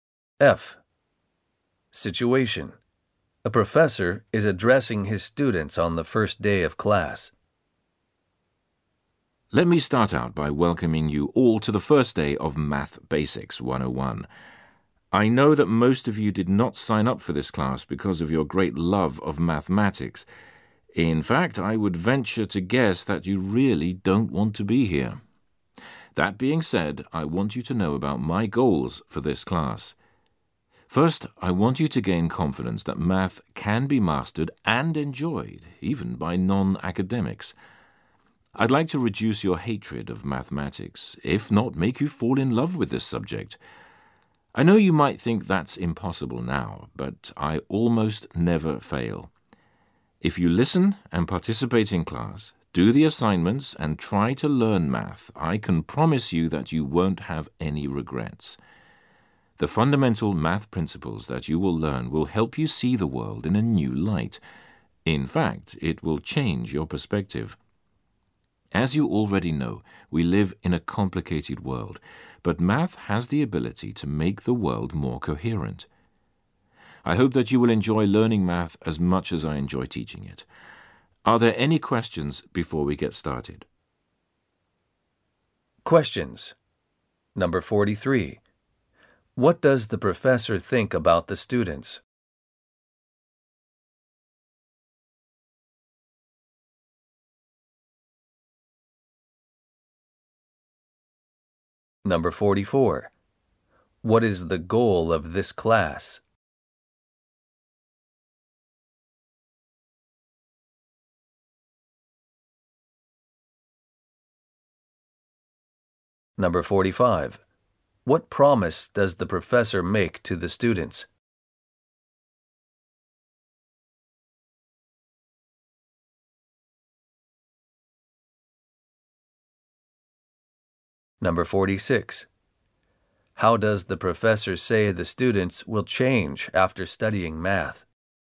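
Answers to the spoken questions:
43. Most of them don't like math and don't really want to be there
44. To help students gain confidence and enjoy math
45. If they participate and work, they won't have any regrets
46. They will see the world in a new light; their perspective will change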